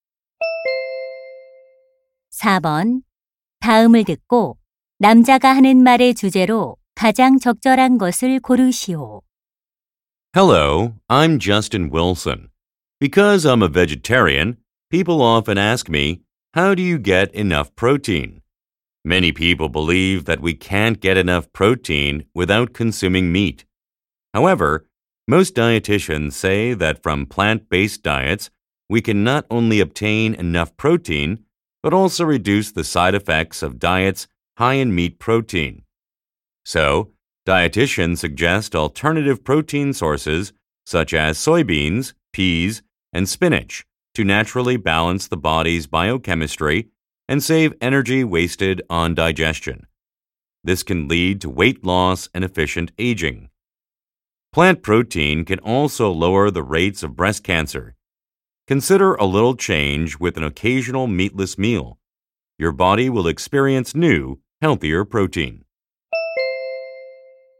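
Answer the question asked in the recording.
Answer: 식물성 단백질 섭취의 이점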